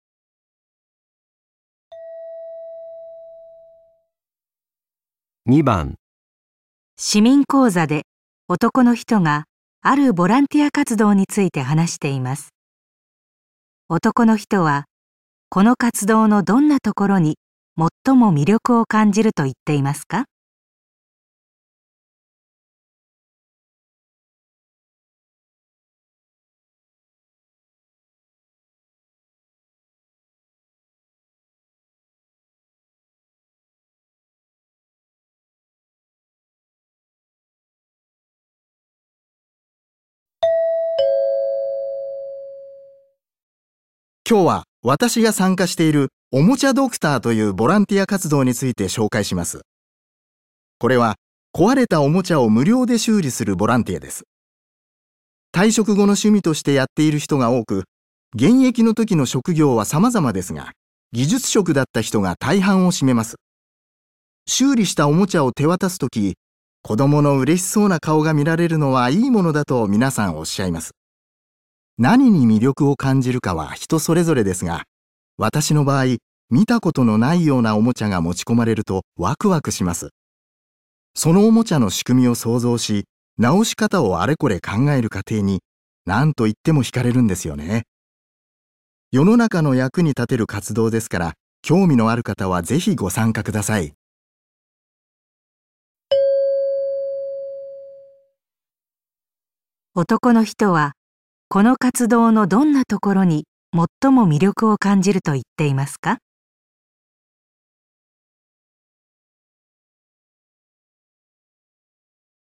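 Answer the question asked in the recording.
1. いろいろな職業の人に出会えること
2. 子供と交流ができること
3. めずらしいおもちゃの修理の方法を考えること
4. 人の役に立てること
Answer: 3. めずらしいおもちゃの修理の方法を考えること

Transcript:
男 : 今日は私が参加している「おもちゃドクター」というボランティア活動について紹介します。これは壊れたお もちゃを無料で修理するボランティアです。 退職後の趣味としてやっている人が多く、 現役の時の職業は様々ですが、技術職だった人が大半を占めます。 修理したおもちゃを手渡す時に子供のうれしそうな顔が見られる のはいいものだと皆さんおっしゃいます。 何に魅力を感じるかは人それぞれですが、私の場合、見たこともない ようなおもちゃが持ち込まれるとわくわくします。 そのおもちゃの仕組みを想像し、直し方をあれこれ考える過程 に何といっても惹かれるんですよね。 世の中の役に立てる活動ですから興味のある方はぜひご参加ください。
男の人はこの活動のどんなところに最も魅力を感じると言っていますか。

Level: N1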